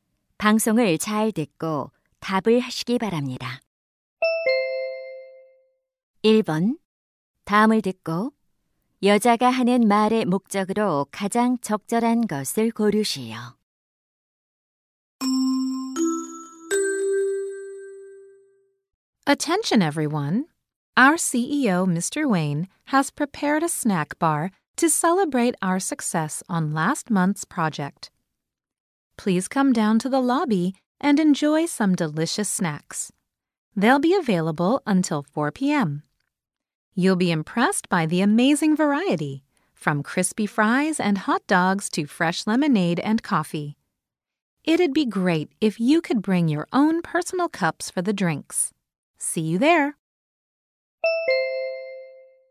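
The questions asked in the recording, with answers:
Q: 다음을 듣고 여자가 하는 말의 목적으로 가장 적절한 것을 고르시오.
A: 로비의 간식 코너에 오도록 안내하려고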